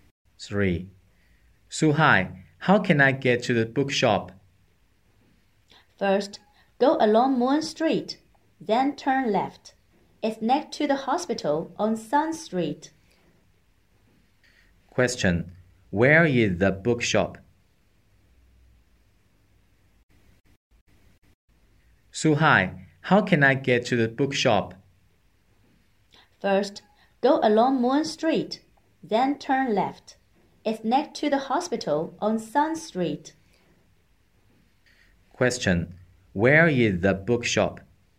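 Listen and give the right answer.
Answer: Next to the hospital on Sun Street.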